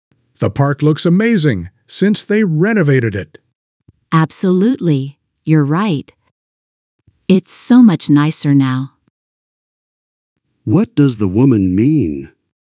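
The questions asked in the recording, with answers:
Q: What does the woman mean?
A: She agrees that the park is much nicer since it was renovated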